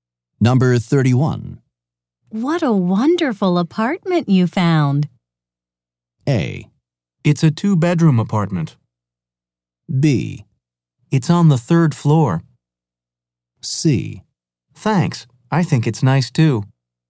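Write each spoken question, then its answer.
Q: What a wonderful apartment you found.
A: C: Thanks. I think it's nice too.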